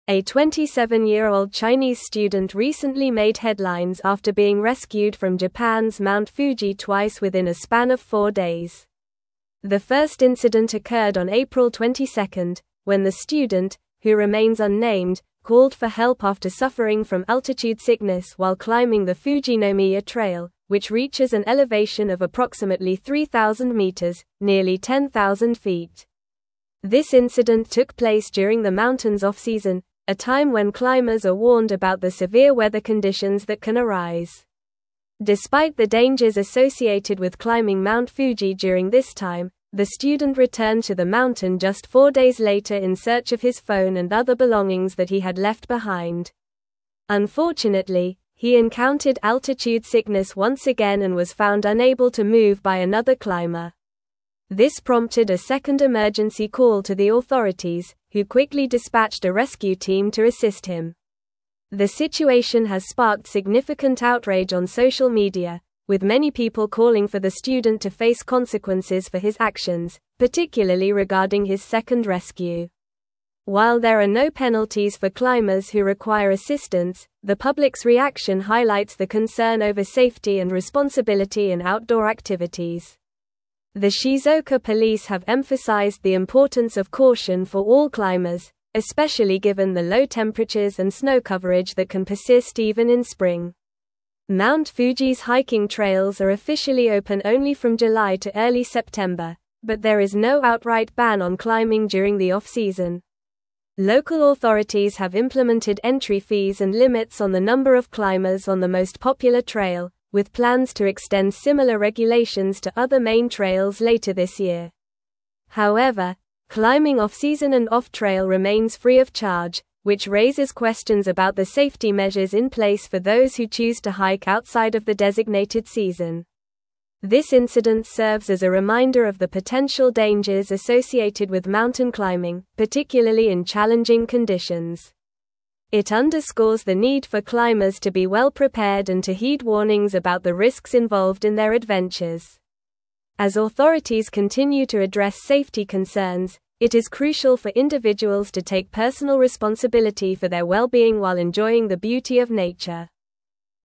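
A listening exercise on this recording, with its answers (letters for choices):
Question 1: How old is the Chinese student who was rescued from Mount Fuji?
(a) 25 years old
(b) 30 years old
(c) 27 years old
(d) 22 years old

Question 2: What type of sickness did the student suffer from while climbing Mount Fuji?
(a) Altitude sickness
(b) Heat exhaustion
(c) Dehydration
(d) Hypothermia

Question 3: How many times was the student rescued from Mount Fuji?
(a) Once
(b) Three times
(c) Four times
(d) Twice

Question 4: What trail was the student climbing when he first called for help?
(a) Yoshida trail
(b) Subashiri trail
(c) Gotemba trail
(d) Fujinomiya trail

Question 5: What time of year did the incidents occur?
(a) Off-season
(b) Peak season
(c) Winter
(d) Summer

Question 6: What did the student return to the mountain to retrieve?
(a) Food and water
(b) A camera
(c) His phone and belongings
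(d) A friend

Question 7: What has sparked outrage on social media regarding the student?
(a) His first rescue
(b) His second rescue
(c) His climbing gear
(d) His age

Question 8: What do local authorities emphasize for climbers on Mount Fuji?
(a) The need for speed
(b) The importance of caution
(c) The benefits of climbing at night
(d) The necessity of climbing in groups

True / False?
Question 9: Mount Fuji's hiking trails are officially open only from July to early September.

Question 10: There are no concerns about safety and responsibility in outdoor activities, particularly during off-season climbing.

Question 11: The first rescue occurred on April 22 due to a sprained ankle while climbing the Fujinomiya trail.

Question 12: The elevation of the Fujinomiya trail is approximately 3,000 meters (nearly 10,000 feet).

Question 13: A 27-year-old American student was rescued from Mount Fuji twice within four days.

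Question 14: The student returned to Mount Fuji four days after the first incident to search for his phone and belongings.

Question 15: The second rescue was prompted by the student experiencing altitude sickness again and being unable to move.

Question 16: The public has expressed support on social media regarding the student's actions during the second rescue.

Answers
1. c
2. a
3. d
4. d
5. a
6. c
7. b
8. b
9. True
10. False
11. False
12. True
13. False
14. True
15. True
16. False

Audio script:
A 27-year-old Chinese student recently made headlines after being rescued from Japan's Mount Fuji twice within a span of four days. The first incident occurred on April 22, when the student, who remains unnamed, called for help after suffering from altitude sickness while climbing the Fujinomiya trail, which reaches an elevation of approximately 3,000 meters (nearly 10,000 feet). This incident took place during the mountain's off-season, a time when climbers are warned about the severe weather conditions that can arise.
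Despite the dangers associated with climbing Mount Fuji during this time, the student returned to the mountain just four days later in search of his phone and other belongings that he had left behind. Unfortunately, he encountered altitude sickness once again and was found unable to move by another climber. This prompted a second emergency call to the authorities, who quickly dispatched a rescue team to assist him.
The situation has sparked significant outrage on social media, with many people calling for the student to face consequences for his actions, particularly regarding his second rescue. While there are no penalties for climbers who require assistance, the public's reaction highlights the concern over safety and responsibility in outdoor activities. The Shizuoka police have emphasized the importance of caution for all climbers, especially given the low temperatures and snow coverage that can persist even in spring.
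Mount Fuji's hiking trails are officially open only from July to early September, but there is no outright ban on climbing during the off-season. Local authorities have implemented entry fees and limits on the number of climbers on the most popular trail, with plans to extend similar regulations to other main trails later this year. However, climbing off-season and off-trail remains free of charge, which raises questions about the safety measures in place for those who choose to hike outside of the designated season.
This incident serves as a reminder of the potential dangers associated with mountain climbing, particularly in challenging conditions. It underscores the need for climbers to be well-prepared and to heed warnings about the risks involved in their adventures. As authorities continue to address safety concerns, it is crucial for individuals to take personal responsibility for their well-being while enjoying the beauty of nature.

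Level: (Level 4)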